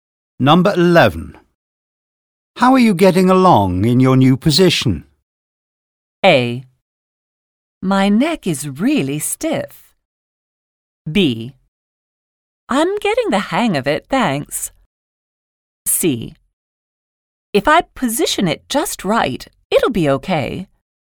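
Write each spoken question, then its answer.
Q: How are you getting along in your new position?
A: B: I'm getting the hang of it, thanks.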